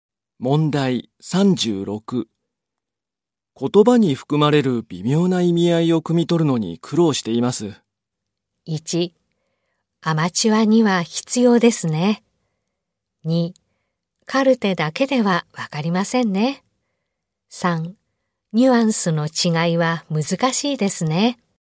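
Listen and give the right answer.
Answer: 3: ニュアンスの違いは難しいですね。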